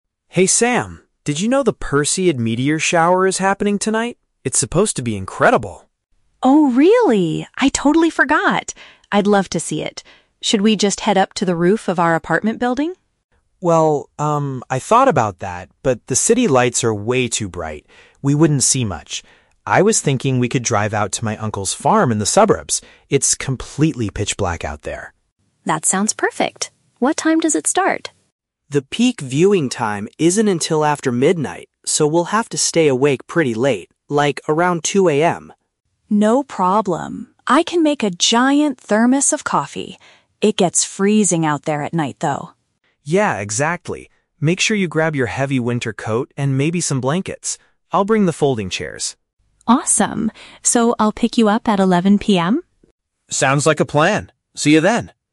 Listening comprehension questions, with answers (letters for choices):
Listen to the conversation between two friends and choose the correct answer (A, B, or C) for each question.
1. Where are the friends going to observe the event?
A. On top of their residential building.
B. At a rural property outside the city.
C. At a local park downtown.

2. What is the man responsible for bringing?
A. Warm clothing.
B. Seating equipment.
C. Hot beverages.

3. What do they have to do to see the meteor shower clearly?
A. Delay their sleep until the early morning hours.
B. Wake up very early before the sun rises.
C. Arrive at the location exactly at midnight.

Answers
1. B
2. B
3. A

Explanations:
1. The man suggests going to his "uncle's farm in the suburbs" (which matches "rural property outside the city"). Option (A) is The Trap: The woman suggests the "roof of our apartment building", but the man rejects it because of the bright city lights. Option (C) is not mentioned.
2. The man specifically says, "I'll bring the folding chairs" (folding chairs = seating equipment). Option (A) is The Trap: "Warm clothing" (heavy winter coat and blankets) is mentioned, but he tells the woman to grab those. Option (C) is also a trap: The woman is the one making the coffee (hot beverages).
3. The man states they will have to "stay awake pretty late. Like, around 2 AM." This means they are staying up, delaying their sleep. Option (B) is The Trap: "Wake up early" sounds similar to 2 AM, but they are staying awake, not waking up. Option (C) is incorrect because they are meeting at 11 PM, not arriving at exactly midnight.

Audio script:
Man: Hey Sam, did you know the Perseid meteor shower is happening tonight? It's supposed to be incredible.
Woman: Oh, really? I totally forgot! I'd love to see it. Should we just head up to the roof of our apartment building?
Man: Well, um, I thought about that, but the city lights are way too bright. We wouldn't see much. I was thinking we could drive out to my uncle's farm in the suburbs. It's completely pitch black out there.
Woman: That sounds perfect! What time does it start?
Man: The peak viewing time isn't until after midnight, so we'll have to stay awake pretty late. Like, around 2 AM.
Woman: No problem, I can make a giant thermos of coffee. It gets freezing out there at night, though.
Man: Yeah, exactly. Make sure you grab your heavy winter coat and maybe some blankets. I'll bring the folding chairs.
Woman: Awesome. So, I'll pick you up at 11 PM?
Man: Sounds like a plan. See you then!